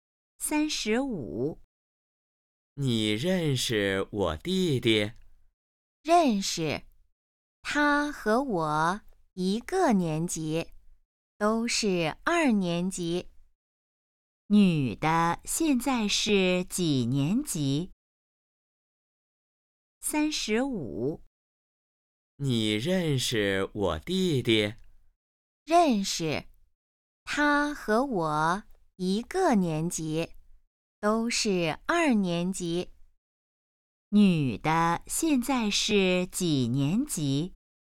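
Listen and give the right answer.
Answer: 二年级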